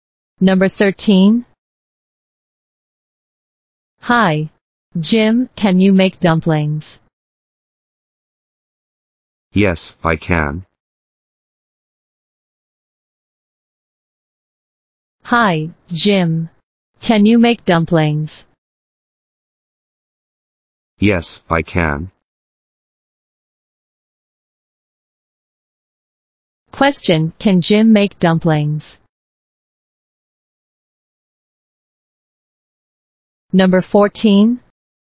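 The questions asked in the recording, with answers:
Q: can Jim make dumplings?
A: Yes, he can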